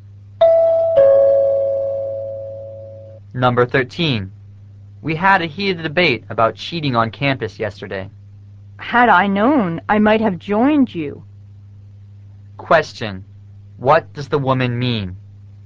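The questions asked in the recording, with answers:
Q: What does the woman mean?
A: She would have joined the debate if she had known about it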